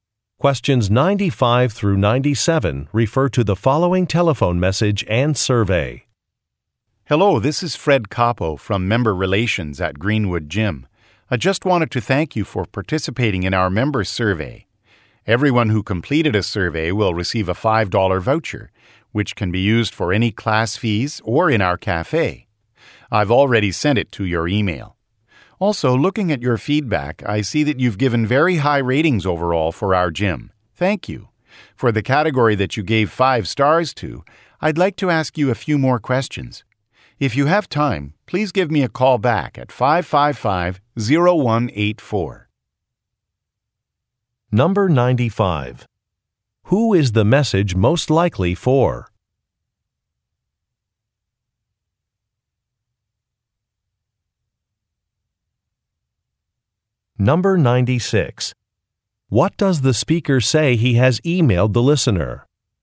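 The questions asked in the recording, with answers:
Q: Who is the message most likely for?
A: A gym member

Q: What does the speaker say he has emailed the listener?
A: A $5 voucher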